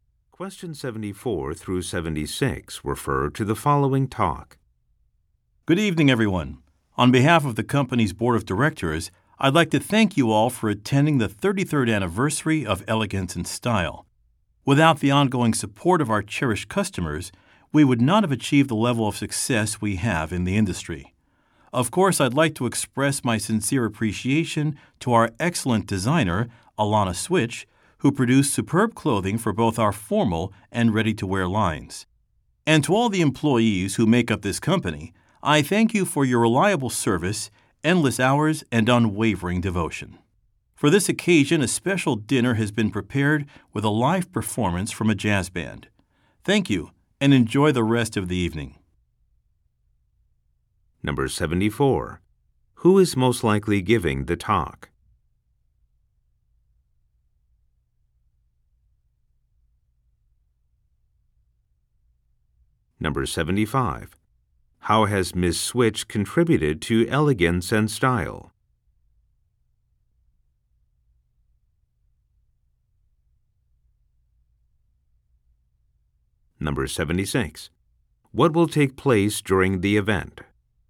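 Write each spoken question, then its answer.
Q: How has Ms. Switch contributed to Elegance and Style?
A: She designed clothing for its formal and ready-to-wear lines

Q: What will take place during the event?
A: A special dinner with a live jazz performance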